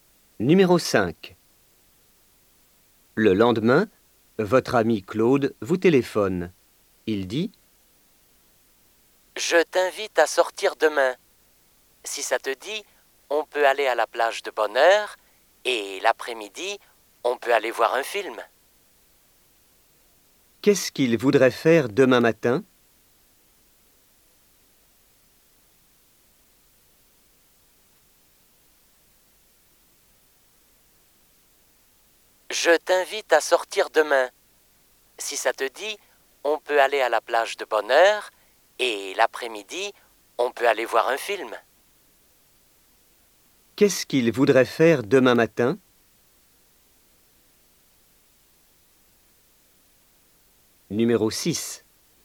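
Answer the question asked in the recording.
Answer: Aller à la plage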